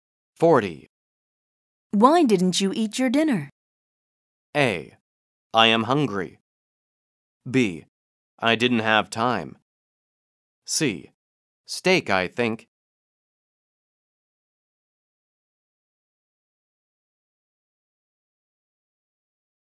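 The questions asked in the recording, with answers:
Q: Why didn't you eat your dinner?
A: B: I didn't have time.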